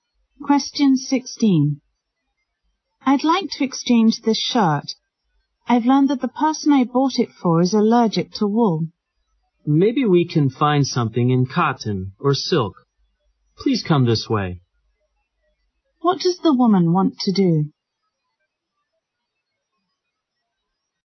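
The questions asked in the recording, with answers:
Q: What does the woman want to do?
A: Exchange a wool shirt for one that isn't wool, because the person it's for is allergic to wool.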